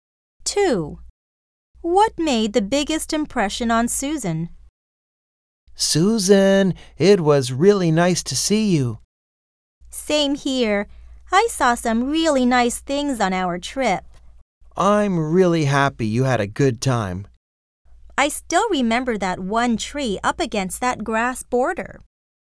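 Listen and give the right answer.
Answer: A tree up against a grass border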